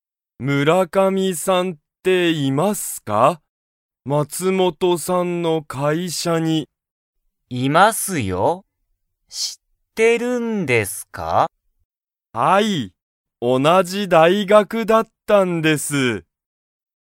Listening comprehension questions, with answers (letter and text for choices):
鈴木(すずき)さんと村上(むらかみ)さんは同(おな)じ____だった。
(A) 会社(かいしゃ)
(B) 大学(だいがく)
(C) 高校(こうこう)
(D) 家(いえ)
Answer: (B) 大学(だいがく)

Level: Level 1